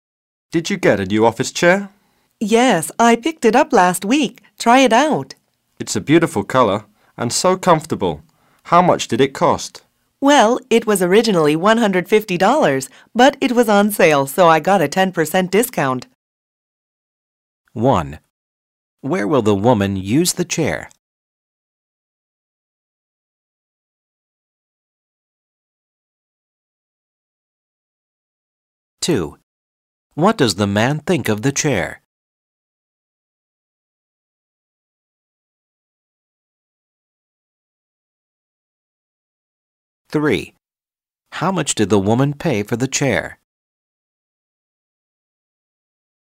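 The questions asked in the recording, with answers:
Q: How much did the woman pay for the chair?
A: $135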